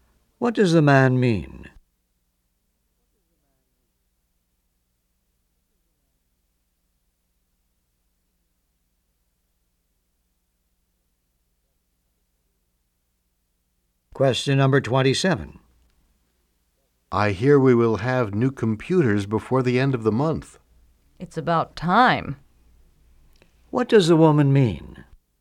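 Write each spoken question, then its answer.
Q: What does the woman mean?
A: The new computers should have come sooner.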